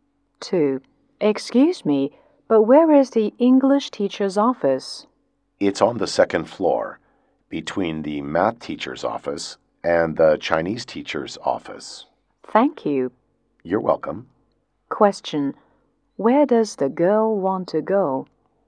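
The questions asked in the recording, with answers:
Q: Where does the girl want to go?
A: The English teacher's office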